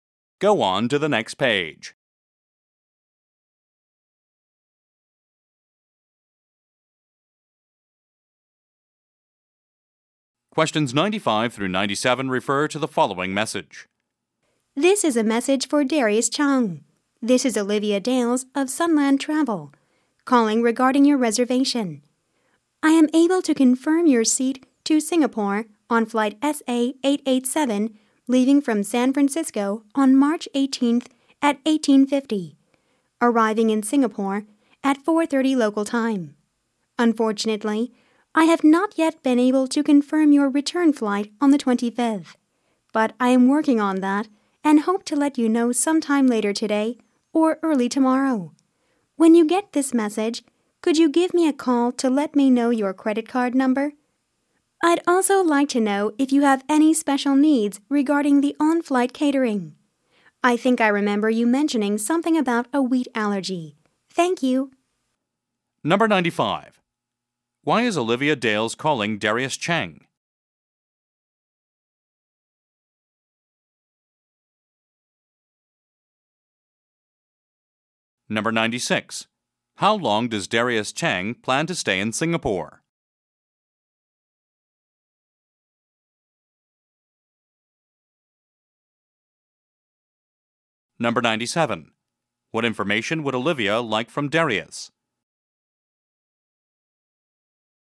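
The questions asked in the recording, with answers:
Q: Why is Olivia Dales calling Darius Chang?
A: To confirm his flight reservation

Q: How long does Darius Chang plan to stay in Singapore?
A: About a week

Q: What information would Olivia like from Darius?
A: His credit card number and any special meal needs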